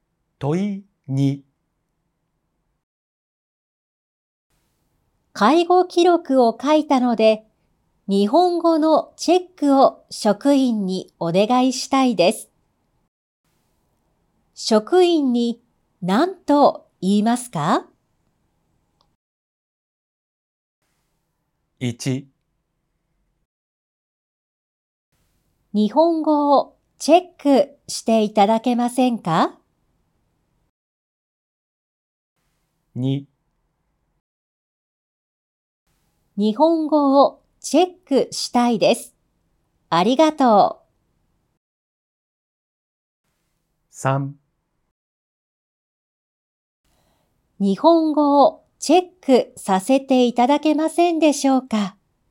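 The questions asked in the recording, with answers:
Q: 職員に何と言いますか?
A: 1: 日本語をチェックしていただけませんか?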